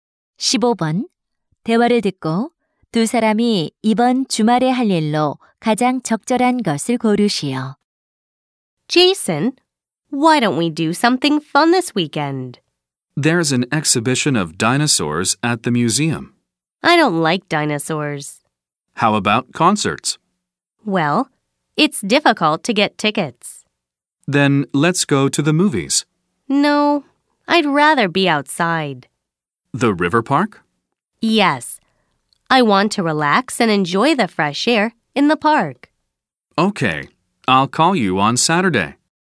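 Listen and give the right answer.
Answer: 강변 공원에 가기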